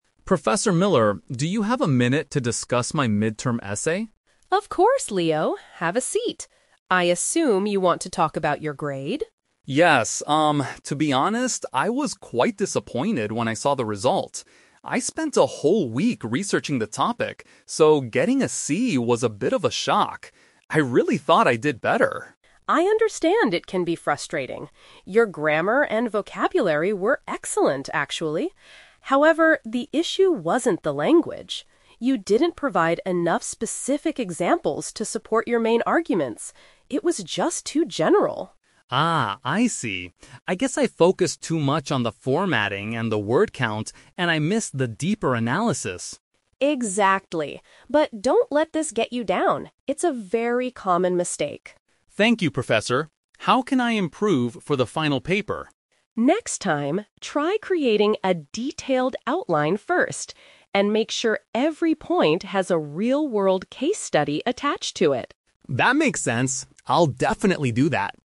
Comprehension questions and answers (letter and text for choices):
Listen to the conversation between a student and his professor. Choose the correct answer (A, B, or C) for each question.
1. How did Leo feel about his essay score?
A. He was upset because he failed the assignment completely.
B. He felt let down because he put a lot of effort into the work.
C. He was annoyed because the professor graded it too late.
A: B. He felt let down because he put a lot of effort into the work.

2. What was the main weakness of Leo's essay?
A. It contained several basic grammar mistakes.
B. It was too short to meet the required word count.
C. It lacked clear evidence to back up his ideas.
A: C. It lacked clear evidence to back up his ideas.

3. What does Professor Miller suggest Leo do for the next assignment?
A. Plan his ideas carefully before he starts writing.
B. Read more books about proper essay formatting.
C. Ask a classmate to check his vocabulary usage.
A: A. Plan his ideas carefully before he starts writing.

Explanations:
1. The Key: Leo says he was "disappointed" (which means let down) and mentions that he "spent a whole week researching" (which means he put a lot of effort into it). The Trap (A): Leo got a 'C'. While this is a low grade for him, it is not a failing grade (Fail = F). The Plausible (C): Students often get annoyed about late grading, but this is never mentioned in the audio.
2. The Key: The professor explains that Leo "didn't provide enough specific examples to support your main arguments." Option C is a perfect paraphrase of this sentence. The Trap (A): The audio mentions "grammar," but the professor actually praises it, saying his grammar and vocabulary were "excellent." The Trap (B): Leo mentions he focused too much on the "word count," but neither of them says the essay was too short.
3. The Key: Professor Miller tells Leo to "try creating a detailed outline first." Creating an outline is the same as planning ideas before writing. The Trap (B): Leo mentions "formatting," but the professor does not tell him to read books about it. In fact, Leo focused too much on formatting. The Trap (C): The professor said his vocabulary was already excellent, so he doesn't need someone to check it.

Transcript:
Leo: Professor Miller, do you have a minute to discuss my mid-term essay?
Miller: Of course, Leo. Have a seat. I assume you want to talk about your grade?
to be honest, I was quite disappointed when I saw the result. I spent a whole week researching the topic, so getting a 'C' was a bit of a shock. I really thought I did better.
Miller: I understand it can be frustrating. Your grammar and vocabulary were excellent, actually. However, the issue wasn't the language. You didn't provide enough specific examples to support your main arguments. It was just too general.
Leo: Ah, I see. I guess I focused too much on the formatting and the word count, and I missed the deeper analysis.
Miller: Exactly. But don't let this get you down. It's a very common mistake.
Leo: Thank you, Professor. How can I improve for the final paper?
Miller: Next time, try creating a detailed outline first. And make sure every point has a real-world case study attached to it.